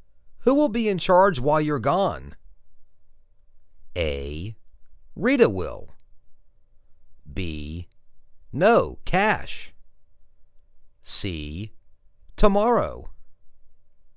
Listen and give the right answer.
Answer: Rita will.